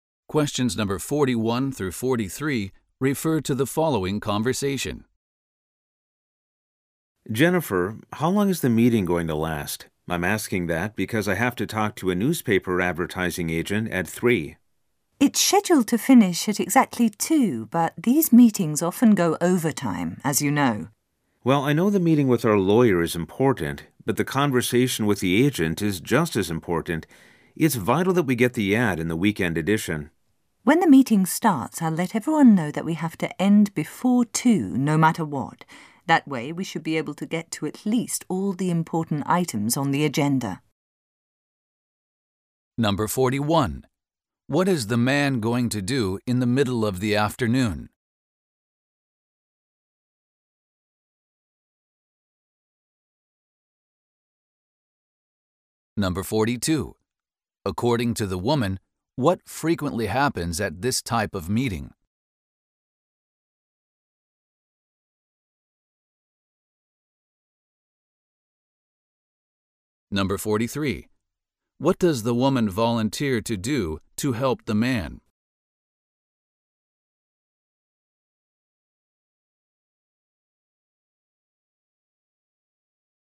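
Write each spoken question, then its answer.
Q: What is the man going to do in the middle of the afternoon?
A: Talk to a newspaper advertising agent

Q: According to the woman, what frequently happens at this type of meeting?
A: They go overtime

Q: What does the woman volunteer to do to help the man?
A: Tell everyone the meeting must end before 2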